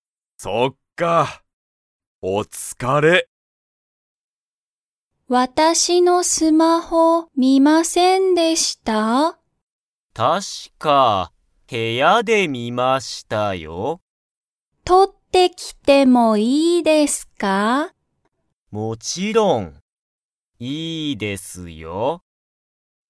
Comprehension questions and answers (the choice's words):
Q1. 石田(いしだ)さんは、林(はやし)さんのスマホを見(み)ましたか?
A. はい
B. いいえ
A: はい

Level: Level 1